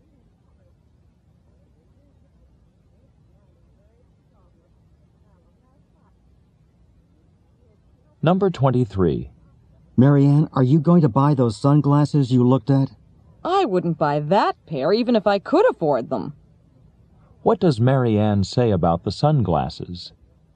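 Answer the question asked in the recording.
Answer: She doesn't like them.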